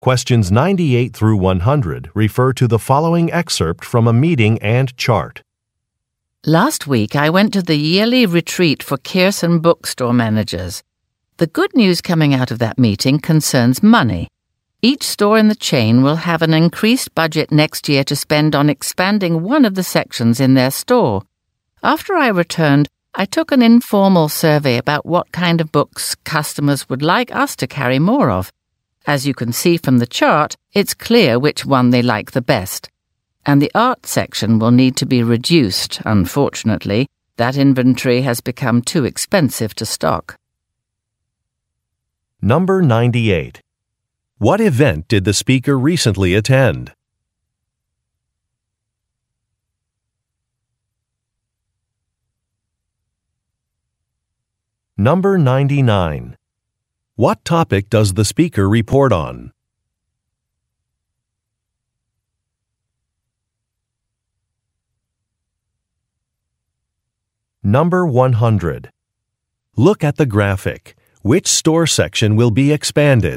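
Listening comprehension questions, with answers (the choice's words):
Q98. What event did the speaker recently attend?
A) An advertising seminar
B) An awards ceremony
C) A managers' meeting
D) A writing workshop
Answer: A managers' meeting

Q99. What topic does the speaker report on?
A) Company finances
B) Human resources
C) Advertising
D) Competitors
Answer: Company finances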